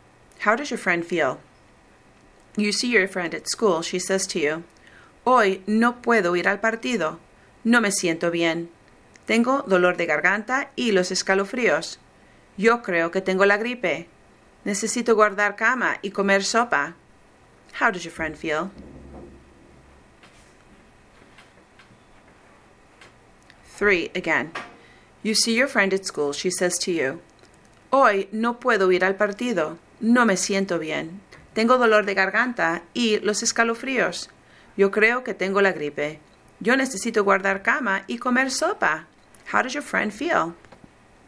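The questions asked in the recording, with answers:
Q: How does your friend feel?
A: Sick; she thinks she has the flu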